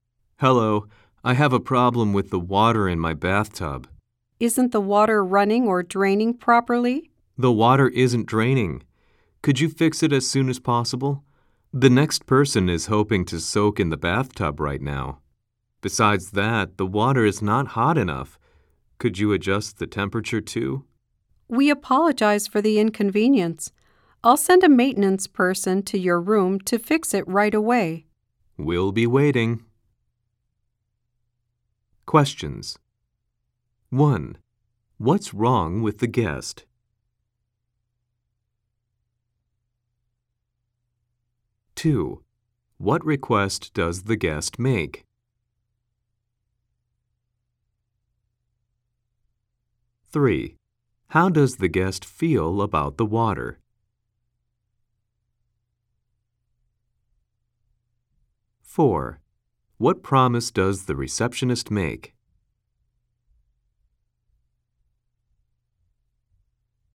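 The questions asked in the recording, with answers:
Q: What's wrong with the guest?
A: The water in the bathtub isn't draining.

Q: What request does the guest make?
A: To fix the drain as soon as possible and adjust the water temperature.

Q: How does the guest feel about the water?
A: It is not hot enough.

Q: What promise does the receptionist make?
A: To send a maintenance person to the room right away.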